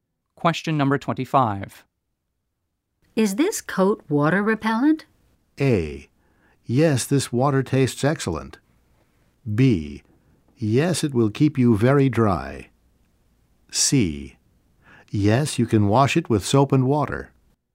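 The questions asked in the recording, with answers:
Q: Is this coat water repellent?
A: B: Yes, it will keep you very dry.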